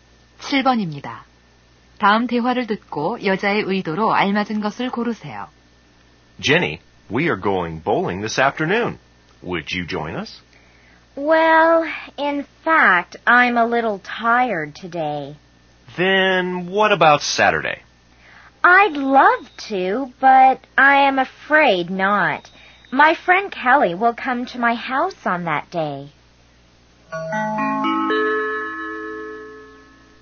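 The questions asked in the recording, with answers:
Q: 다음 대화를 듣고 여자의 의도로 알맞은 것을 고르세요.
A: 거절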